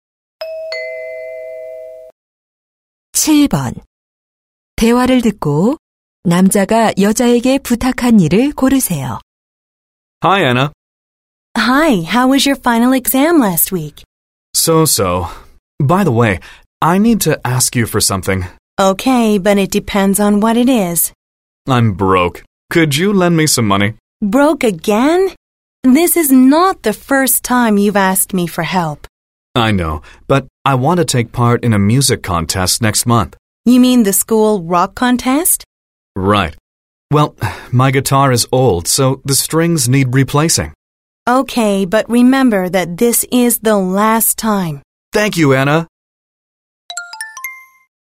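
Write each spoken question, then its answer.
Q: 대화를 듣고 남자가 여자에게 부탁한 일을 고르세요.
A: 돈 빌려주기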